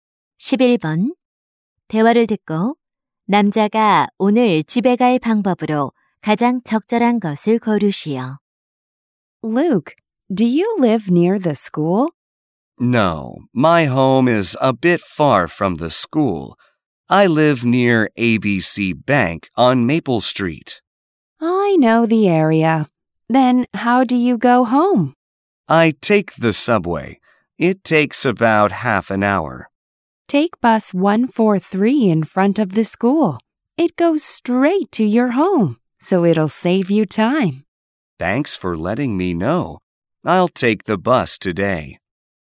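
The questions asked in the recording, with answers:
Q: 대화를 듣고 남자가 오늘 집에 갈 방법으로 가장 적절한 것을 고르시오.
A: 버스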